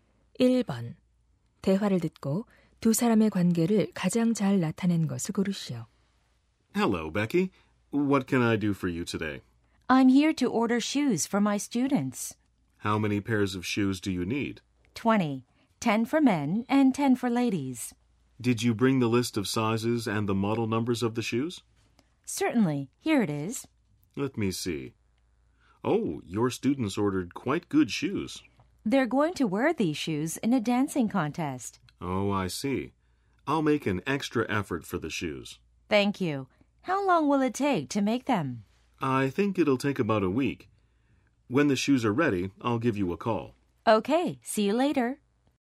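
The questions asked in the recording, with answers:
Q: 대화를 듣고 두 사람의 관계를 가장 잘 나타낸 것을 고르시오.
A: 선생님 - 구두 제작자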